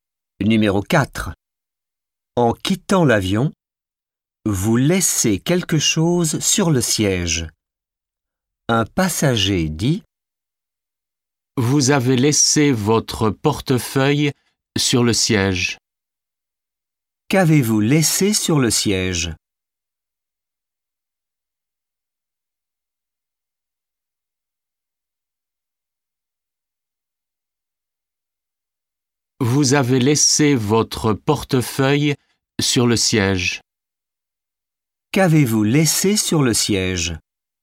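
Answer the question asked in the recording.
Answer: Votre portefeuille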